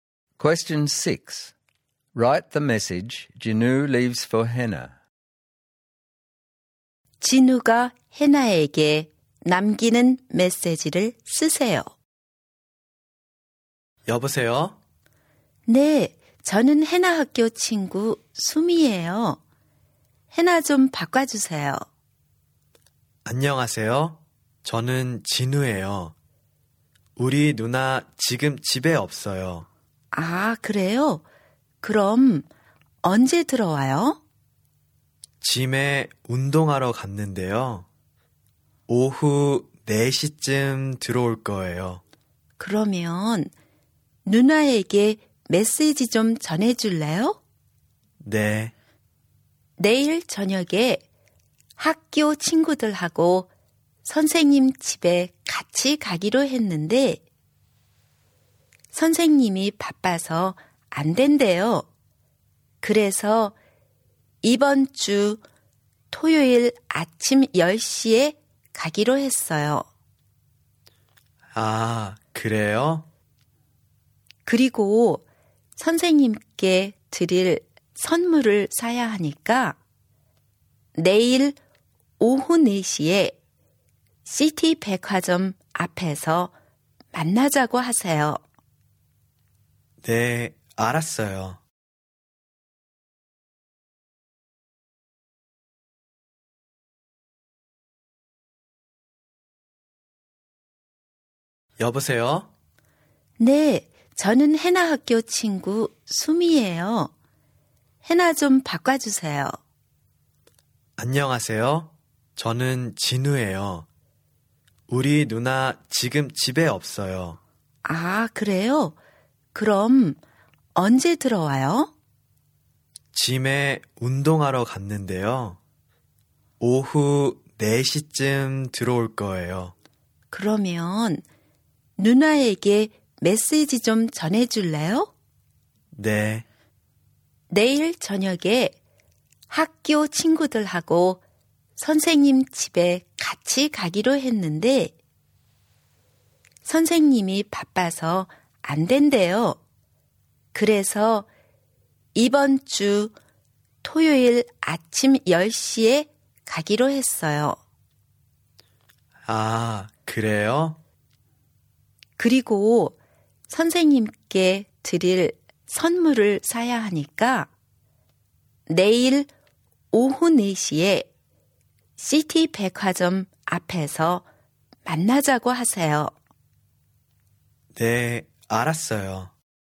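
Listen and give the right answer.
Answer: 수미 전화: 내일 저녁 선생님 댁 방문이 선생님이 바빠서 이번 주 토요일 아침 10시로 바뀜. 선물을 사러 내일 오후 4시에 시티 백화점 앞에서 만나자고 함.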